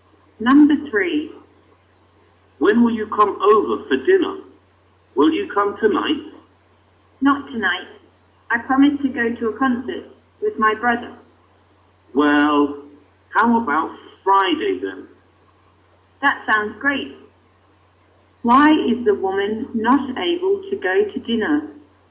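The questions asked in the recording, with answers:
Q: Why is the woman not able to go to dinner?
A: She promised to go to a concert with her brother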